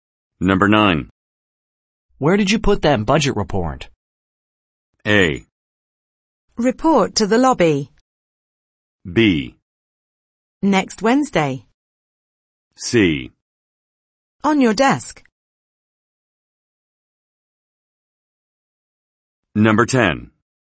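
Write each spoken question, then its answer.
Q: Where did you put that budget report?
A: C: On your desk.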